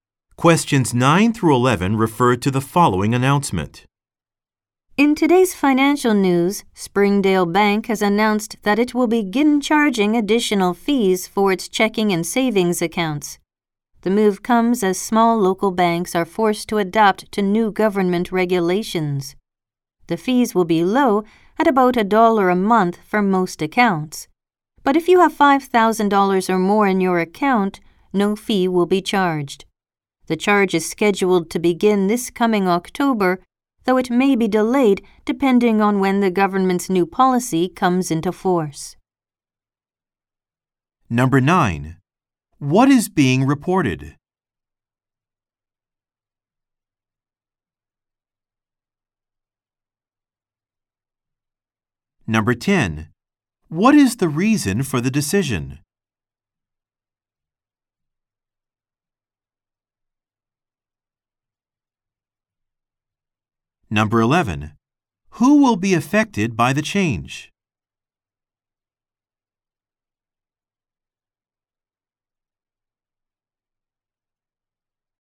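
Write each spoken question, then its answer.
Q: What is being reported?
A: Springdale Bank will begin charging fees for checking and savings accounts

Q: What is the reason for the decision?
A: New government regulations

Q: Who will be affected by the change?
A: Account holders with less than $5,000 in their accounts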